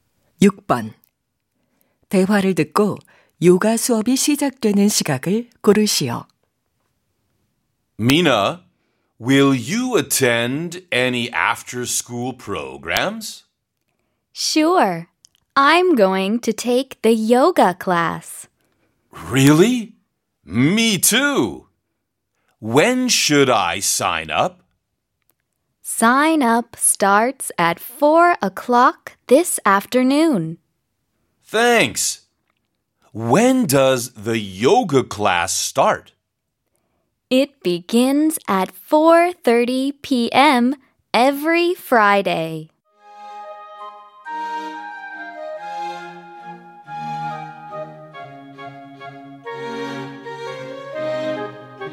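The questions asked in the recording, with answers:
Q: 대화를 듣고 요가 수업이 시작되는 시각을 고르시오.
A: 오후 4시 30분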